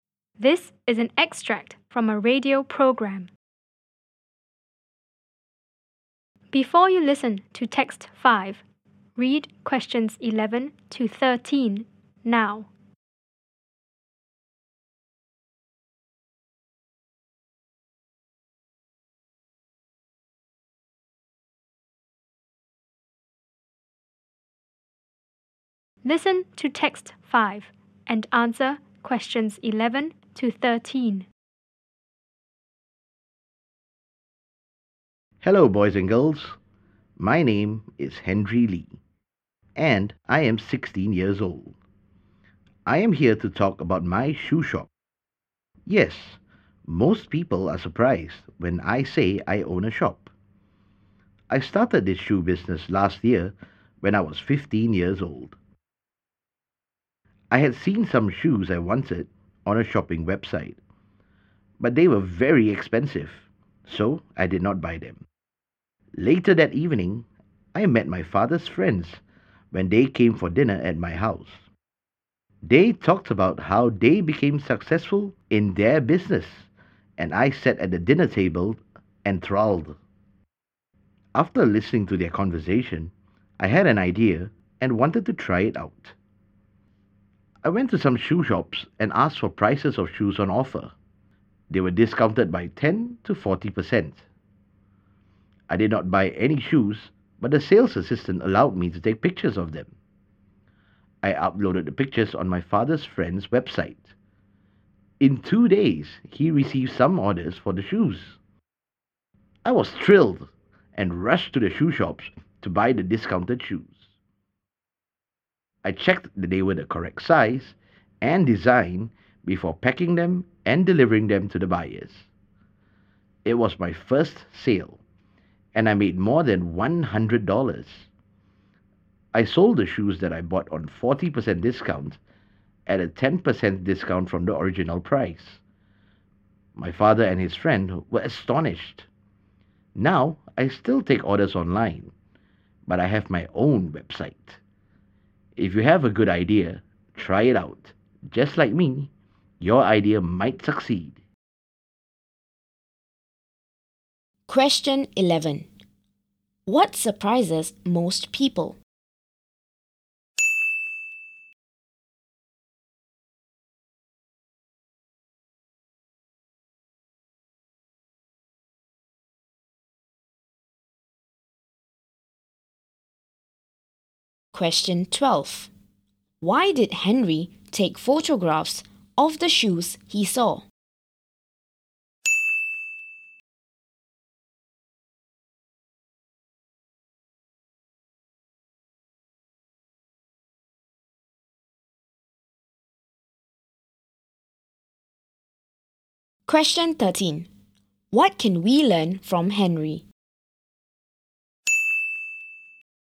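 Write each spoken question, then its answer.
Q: What surprises most people?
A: That Henry, a teenager, owns a shop

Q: Why did Henry take photographs of the shoes he saw?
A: To upload them on his father's friend's website to get orders

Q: What can we learn from Henry?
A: If you have a good idea, try it out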